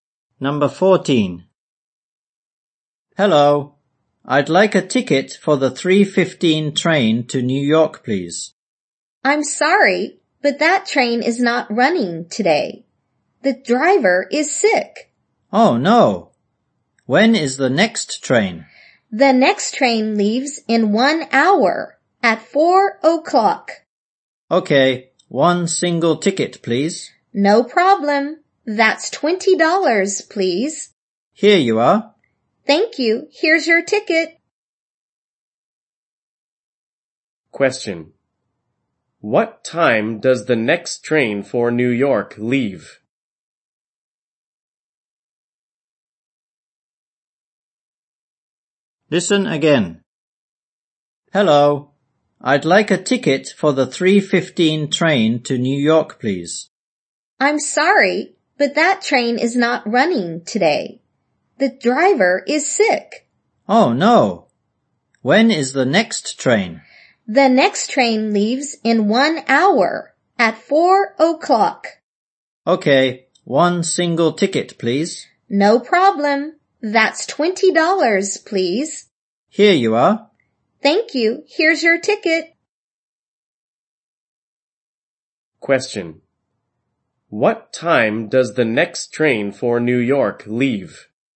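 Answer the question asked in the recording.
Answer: At 4:00.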